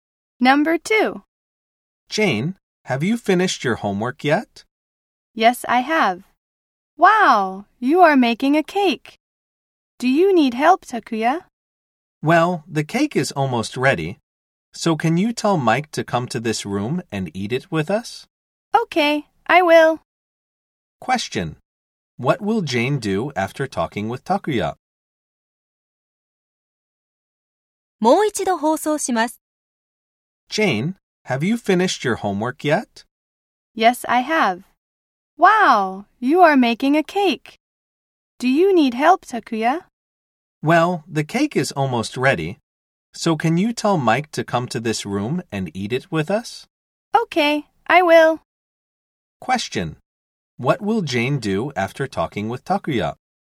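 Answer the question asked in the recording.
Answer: She will tell Mike to come to the room and eat the cake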